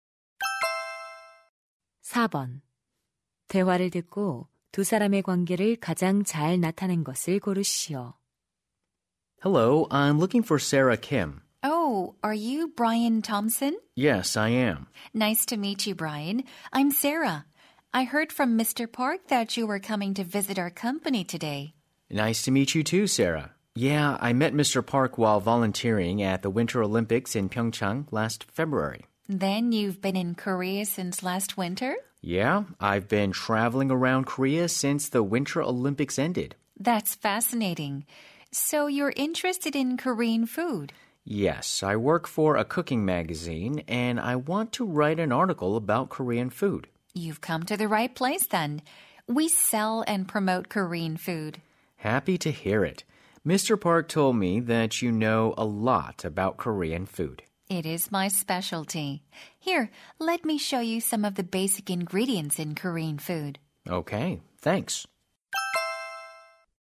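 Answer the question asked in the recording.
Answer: 요리 잡지 기자 - 한식 판매 회사 직원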